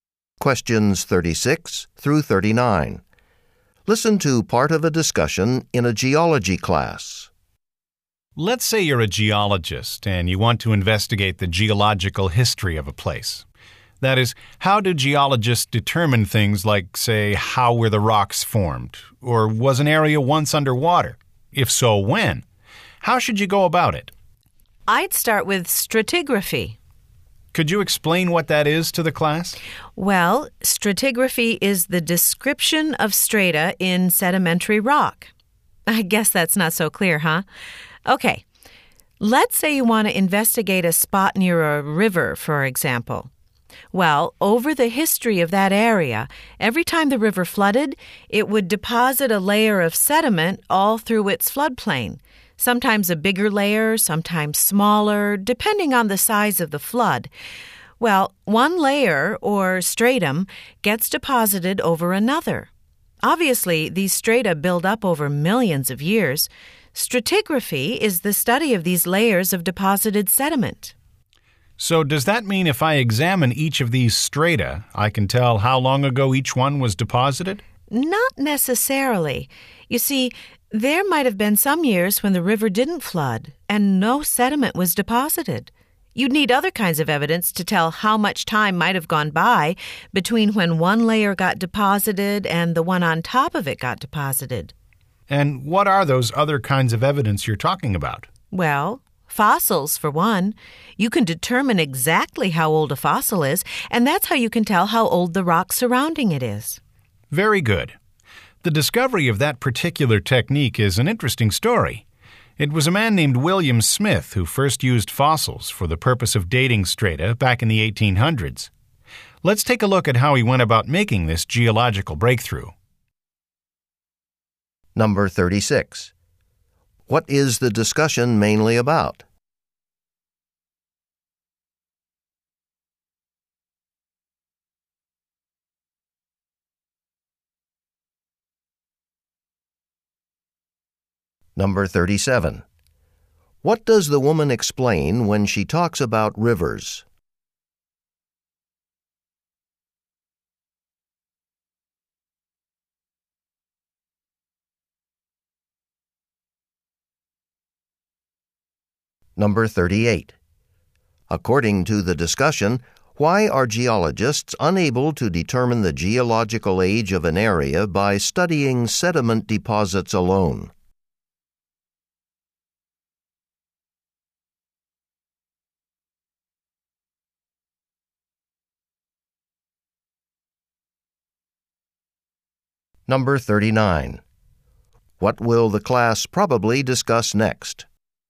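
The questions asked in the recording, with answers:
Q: What is the discussion mainly about?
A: How geologists figure out an area's geological history (stratigraphy).

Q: What does the woman explain when she talks about rivers?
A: How river floods lay down layers of sediment (strata).

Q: According to the discussion, why are geologists unable to determine the geological age of an area by studying sediment deposits alone?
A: Some years there were no floods, so no sediment was laid down.

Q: What will the class probably discuss next?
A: How William Smith used fossils to date strata.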